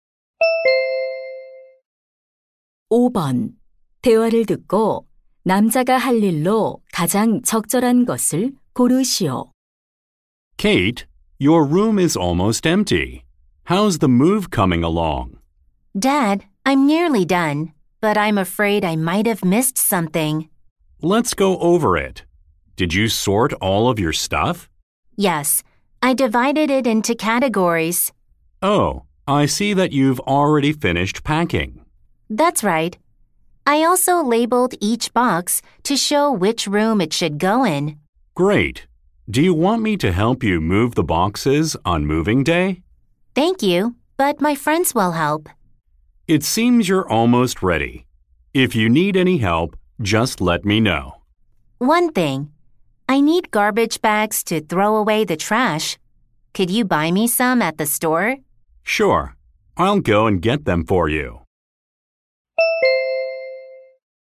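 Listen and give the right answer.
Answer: 쓰레기봉투 사 오기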